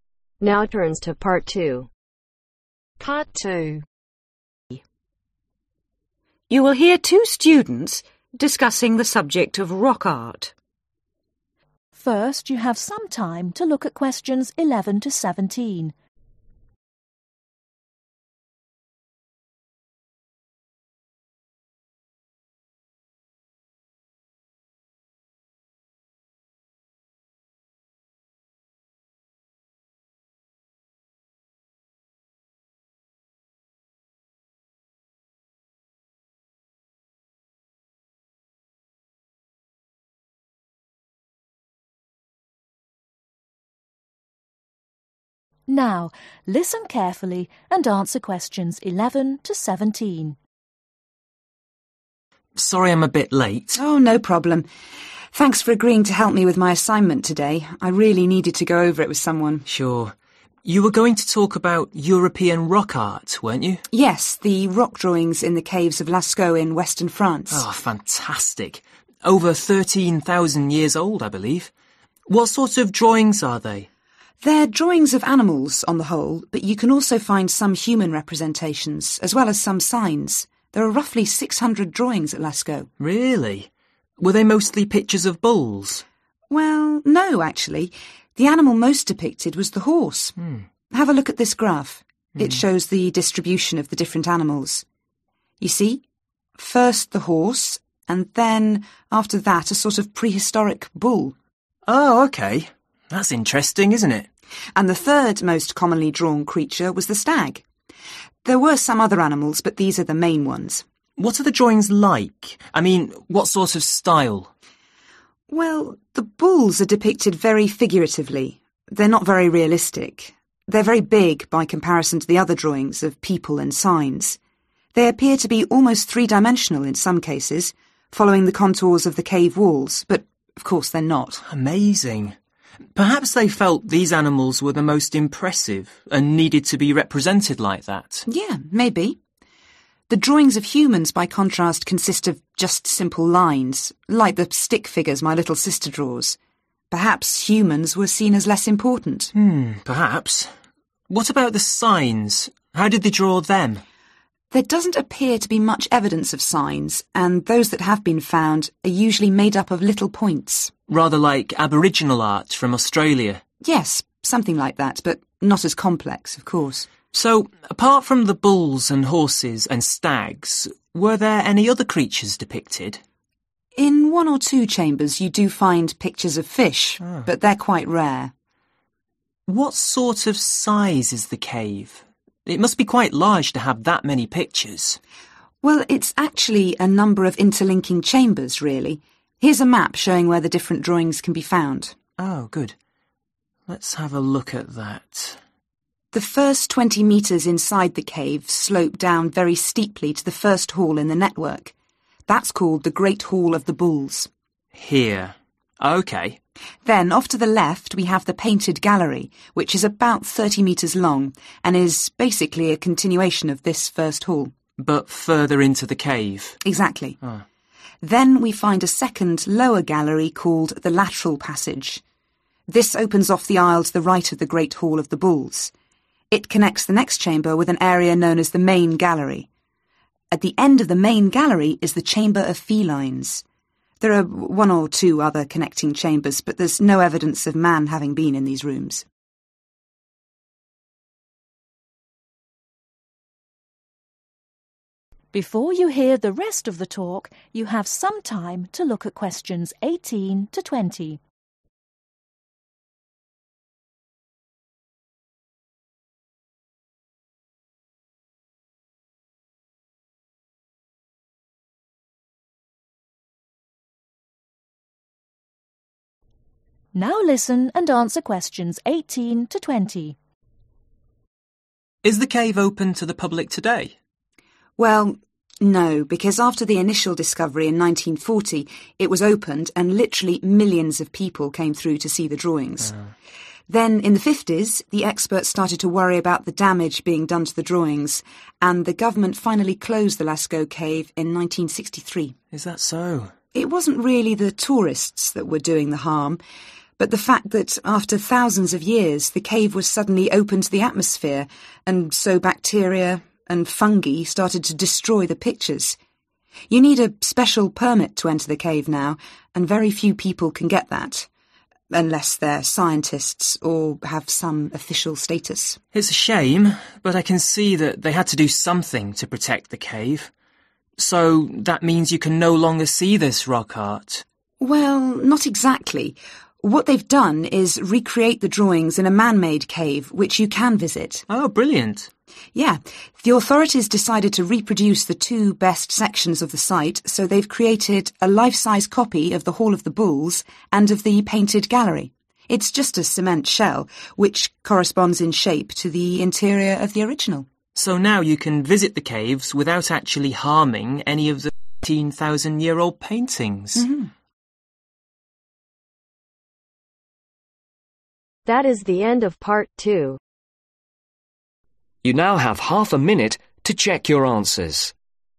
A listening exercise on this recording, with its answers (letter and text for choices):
Choose your answer from the box and write the letters A-H next to questions 12-15.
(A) uncommon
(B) realistic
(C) two – dimensional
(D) childish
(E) consisting of dots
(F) complex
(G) important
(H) huge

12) bulls ............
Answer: (H) huge

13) humans ............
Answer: (D) childish

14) signs ............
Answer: (E) consisting of dots

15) fish ............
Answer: (A) uncommon

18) The cave was closed in 1963 because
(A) the tourists had drawn pictures on the walls.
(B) the air was harming the rock art.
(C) so few people were visiting the site.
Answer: (B) the air was harming the rock art.

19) How does David feel about the closure of the cave ?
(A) he agrees with the decision.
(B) he thinks it was a bad idea.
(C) he has no views on the matter.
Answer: (A) he agrees with the decision.

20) How can people enjoy the drawings today ?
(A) The government has re – opened the cave.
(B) The drawings have been photographed.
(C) The replica of the cave has been built.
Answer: (C) The replica of the cave has been built.